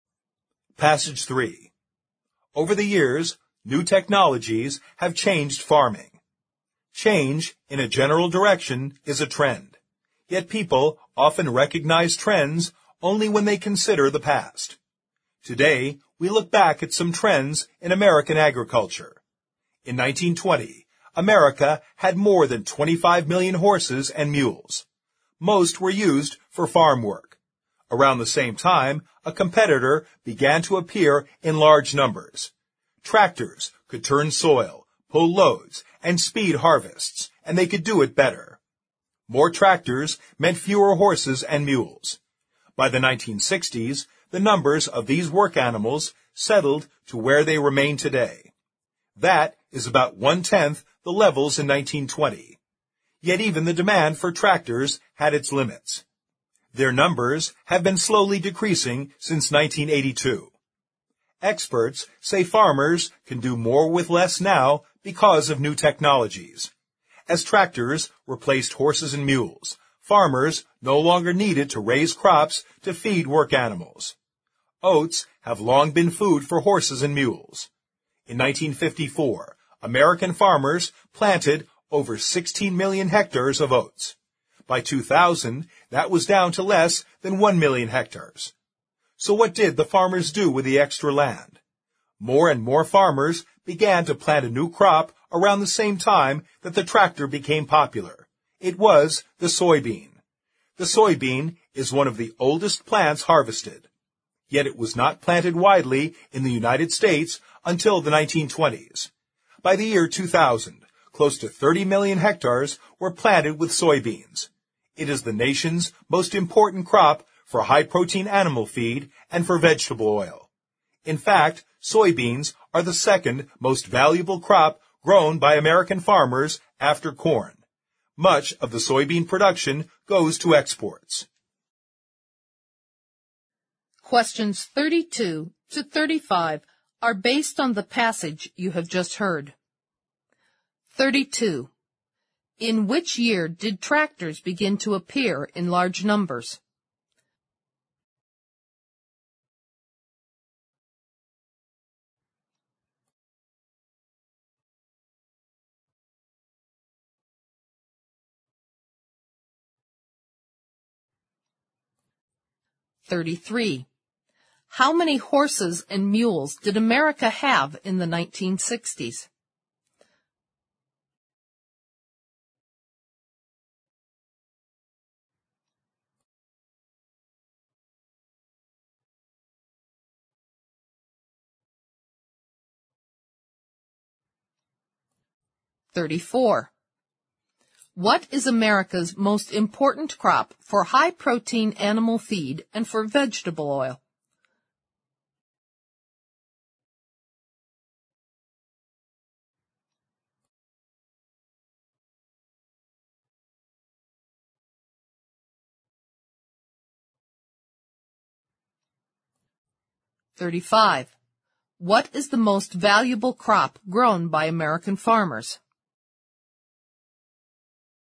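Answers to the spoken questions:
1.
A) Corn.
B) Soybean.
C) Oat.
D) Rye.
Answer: B) Soybean.
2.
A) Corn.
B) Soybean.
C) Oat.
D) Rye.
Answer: A) Corn.
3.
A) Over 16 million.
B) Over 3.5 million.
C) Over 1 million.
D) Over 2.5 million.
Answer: D) Over 2.5 million.
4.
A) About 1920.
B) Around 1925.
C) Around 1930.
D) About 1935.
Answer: A) About 1920.

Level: 四级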